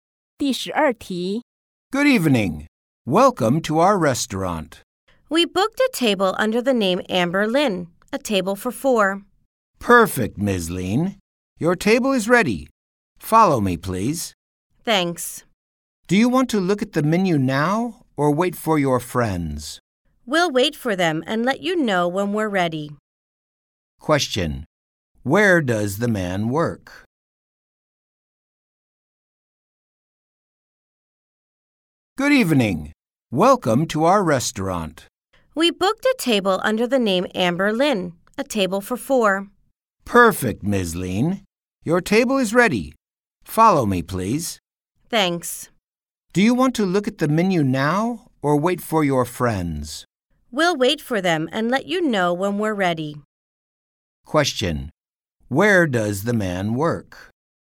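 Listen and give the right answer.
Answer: At a restaurant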